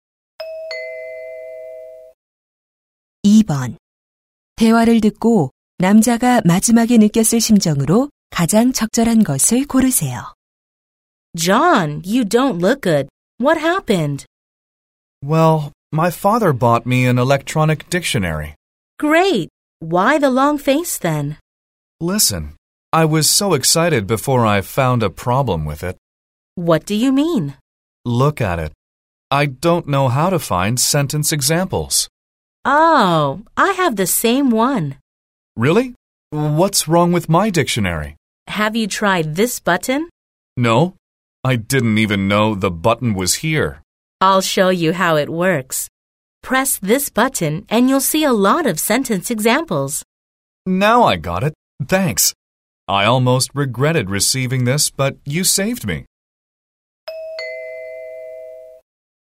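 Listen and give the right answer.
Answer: 안도함, 고마움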